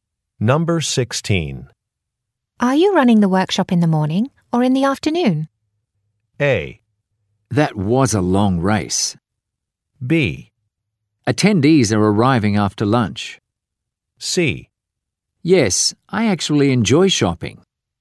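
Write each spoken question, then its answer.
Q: Are you running the workshop in the morning or in the afternoon?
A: B: Attendees are arriving after lunch.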